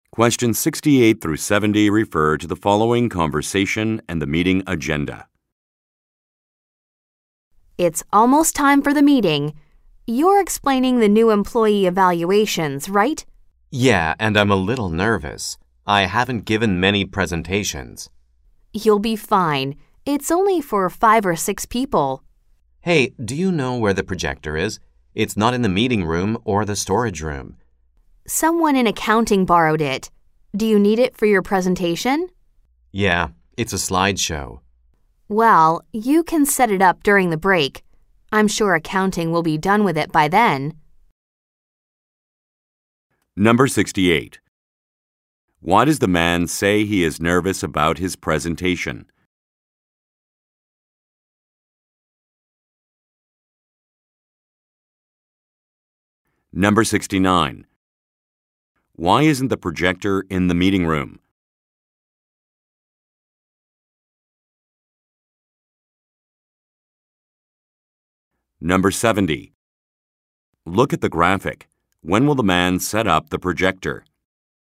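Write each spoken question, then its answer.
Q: Why does the man say he is nervous about his presentation?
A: He hasn't given many presentations.

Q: Why isn't the projector in the meeting room?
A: Someone in accounting borrowed it.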